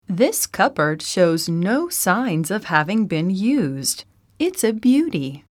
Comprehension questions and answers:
英文の音声を一度だけ聞いて,空所のことばを記入しなさい。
This cupboard shows no signs of _______. It's a beaty!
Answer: having been used